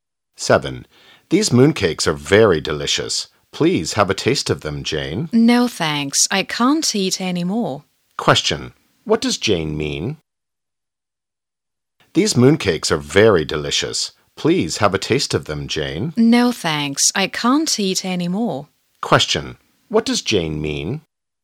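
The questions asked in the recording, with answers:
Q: What does Jane mean?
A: She is full and can't eat any more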